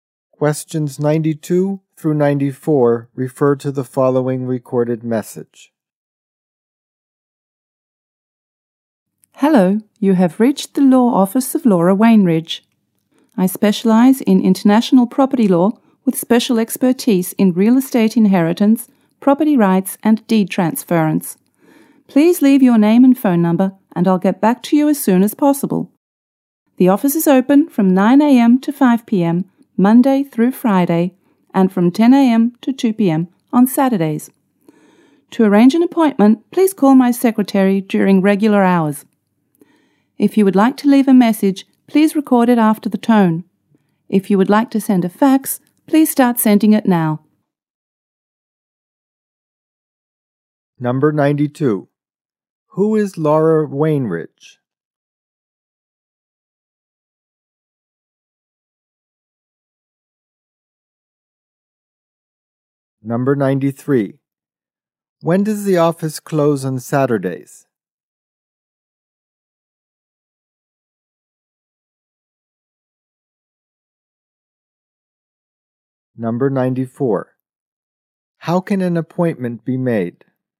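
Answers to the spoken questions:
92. A lawyer specializing in international property law
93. At 2 p.m.
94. By calling the secretary during regular hours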